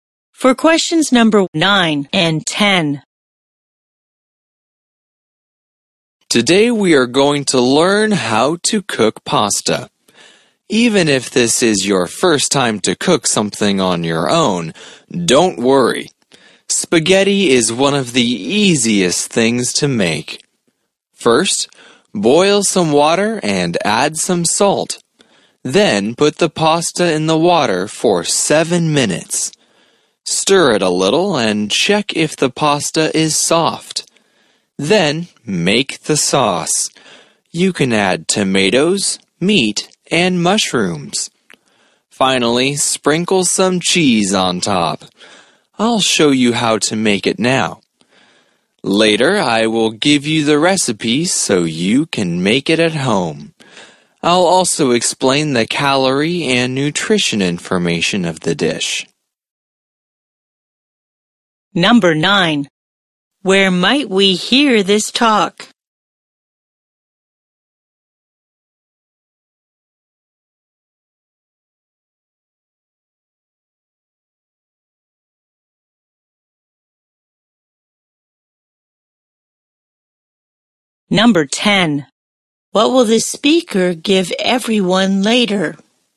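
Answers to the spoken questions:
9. In a cooking class
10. The recipe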